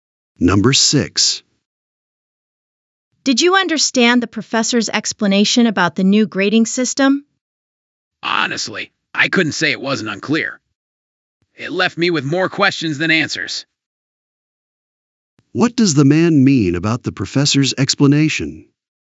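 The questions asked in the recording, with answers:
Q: What does the man mean about the professor's explanation?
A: It was unclear and left him with more questions.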